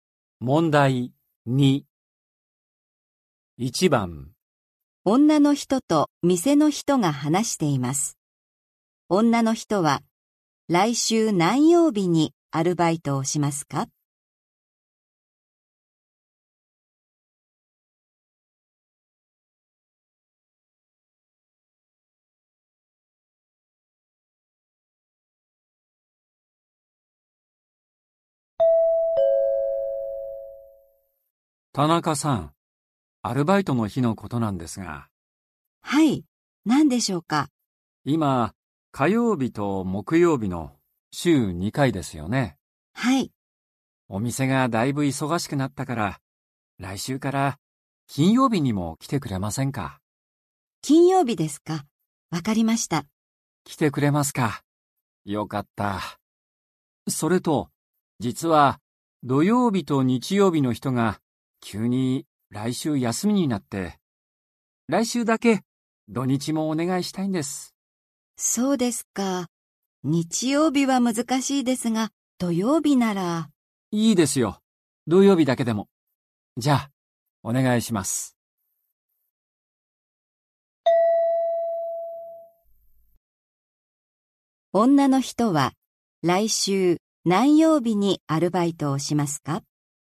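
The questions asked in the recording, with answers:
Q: 女の人は来週何曜日にアルバイトをしますか?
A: 火曜日、木曜日、金曜日、土曜日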